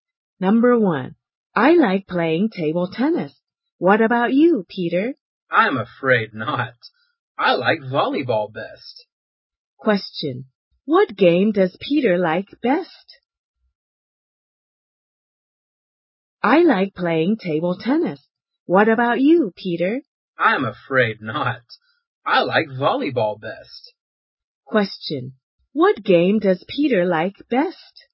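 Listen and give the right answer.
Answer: Volleyball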